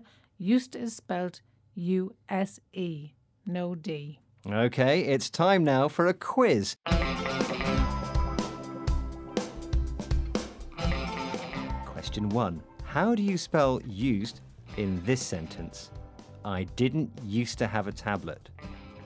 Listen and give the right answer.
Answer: It's U-S-E without D because it's a negative.